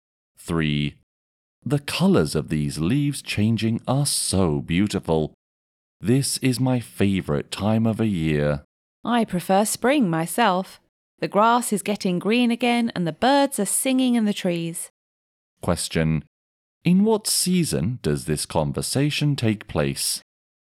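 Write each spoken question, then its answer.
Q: In what season does this conversation take place?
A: Autumn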